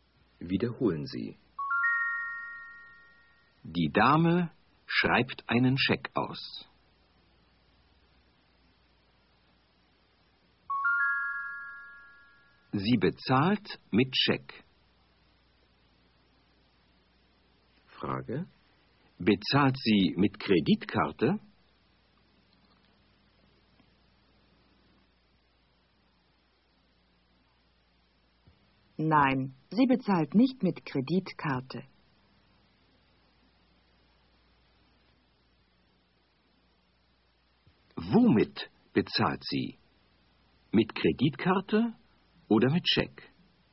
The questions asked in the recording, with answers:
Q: Womit bezahlt sie? Mit Kreditkarte oder mit Scheck?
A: Sie bezahlt mit Scheck.